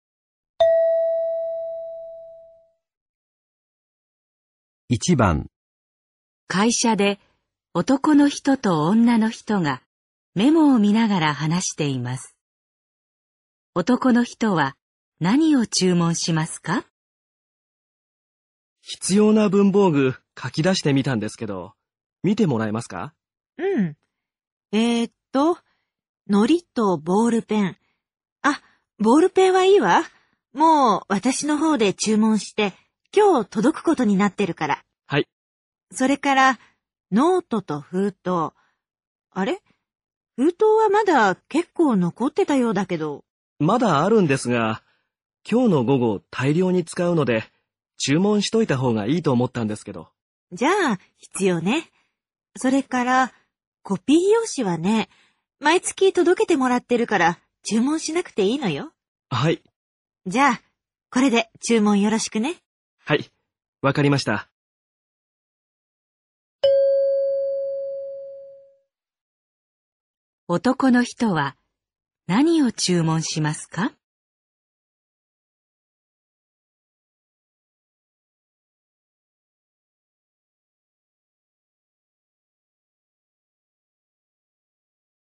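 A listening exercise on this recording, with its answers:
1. 男の人は何を注文しますか。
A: のりとノートと封筒

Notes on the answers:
男人列了采购清单,女人说胶水没问题,圆珠笔自己已经订购了,就不用再买了。笔记本可以,信封还有一些,男人说下午要用很多,所以需要再订购些。复印纸每月会送,所以就不用再买了。

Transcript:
男:必要な文房具書き出してみたんですけど、見ってもらえますか。
女 :うん。ええと、のりとボールペン。あっ、ボールペンはいいわ。もう私のほうで注文して今日届くことになってるから。
男:はい。
女:それから、ノートと封筒。あれ、封筒はまだ結構残ってたようだけど。
男:まだあるんですが、今日午後大量に使うので、注文しといたほうがいいと思ったんですけど。
女:じゃあ、必要ね。それから、コピー用紙わね、毎月届けてもらってるから注文しなくていいのよ。
男:はい。
女:じゃ、これで注文よろしくね。
男:はい、わかりました。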